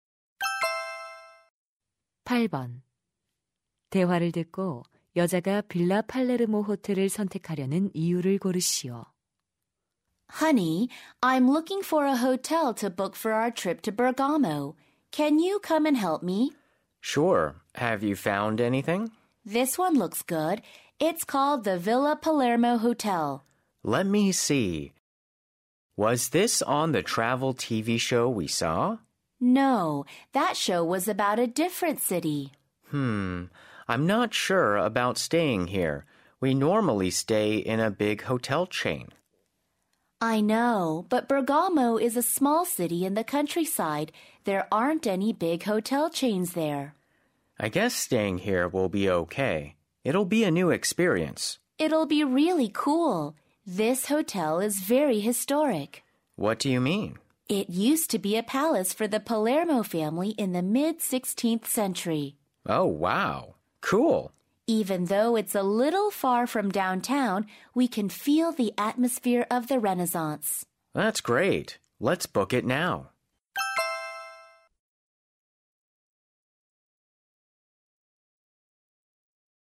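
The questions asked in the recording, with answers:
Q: 대화를 듣고 여자가 빌라 팔레르모 호텔을 선택하려는 이유를 고르시오.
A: 16세기 가문의 궁전이었던 역사적인 호텔이라서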